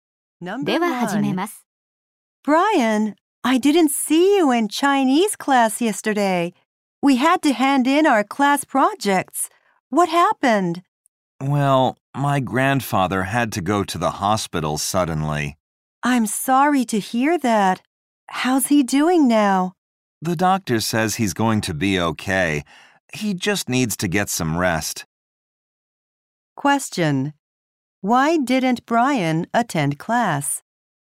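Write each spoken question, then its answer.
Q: Why didn't Brian attend class?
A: His grandfather suddenly had to go to the hospital.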